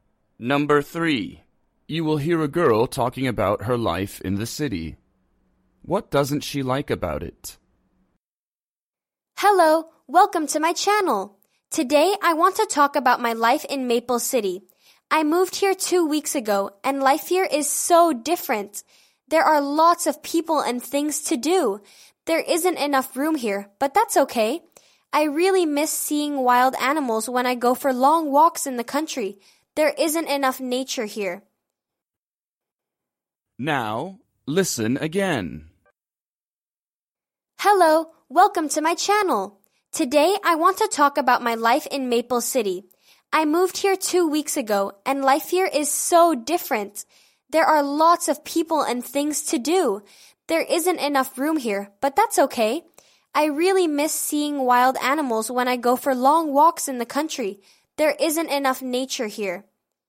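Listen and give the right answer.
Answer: There isn't enough nature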